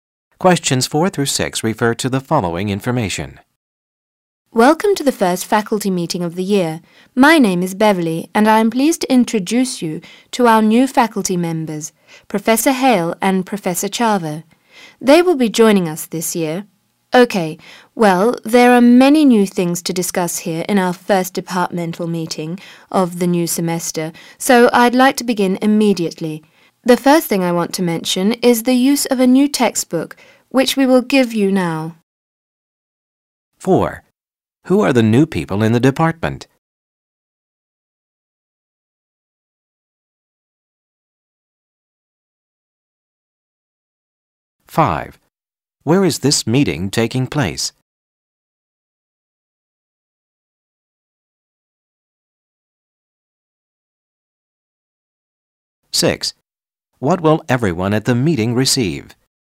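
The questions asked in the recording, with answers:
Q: Who are the new people in the department?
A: Professor Hale and Professor Chava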